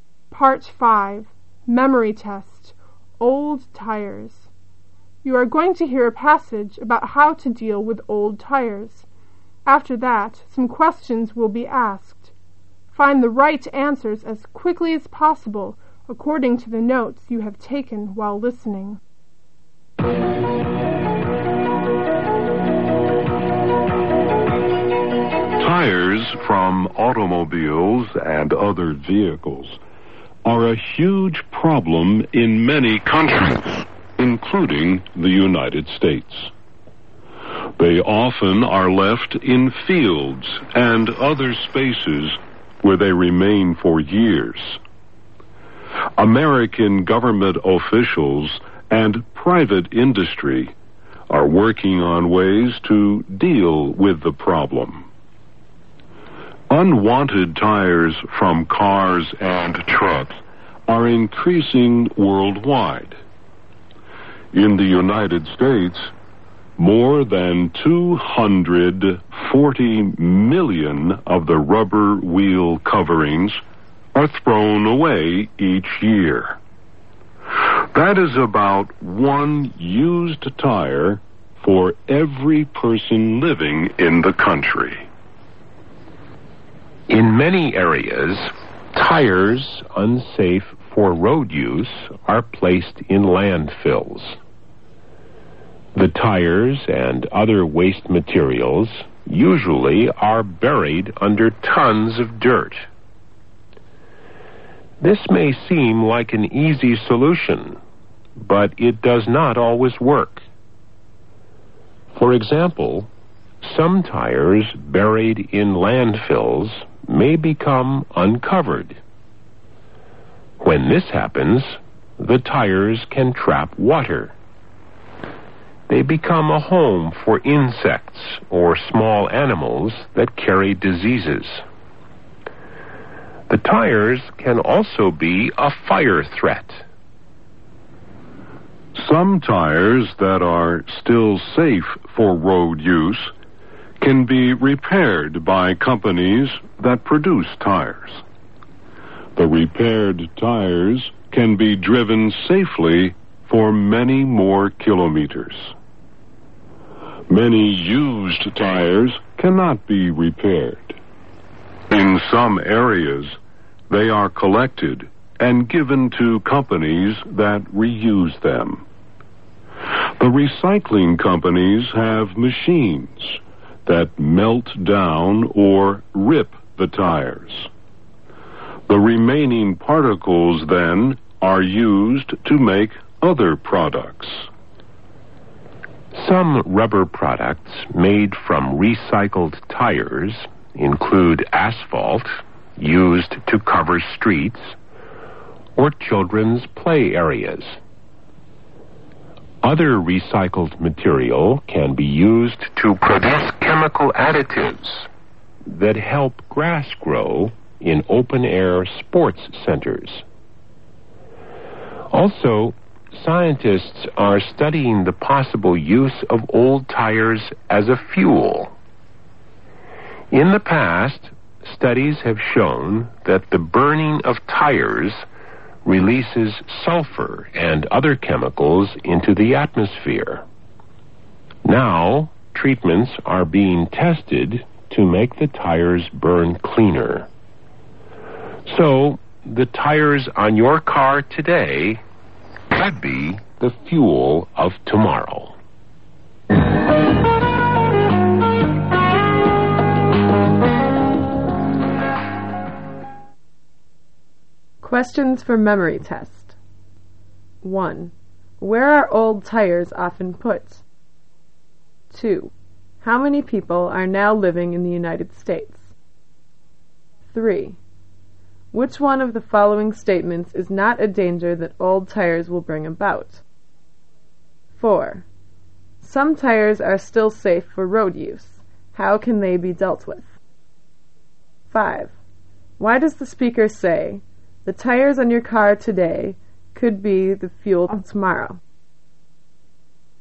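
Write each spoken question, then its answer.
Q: How many people are now living in the United States?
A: About 240 million

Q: Why does the speaker say, "The tires on your car today could be the fuel of tomorrow"?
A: Because scientists are testing ways to make old tires burn cleaner so they can be used as fuel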